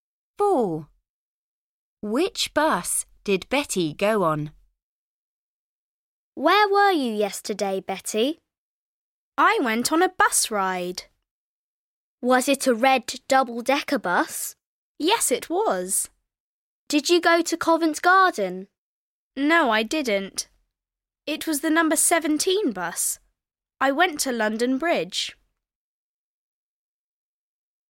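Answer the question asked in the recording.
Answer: The red double-decker number 17 bus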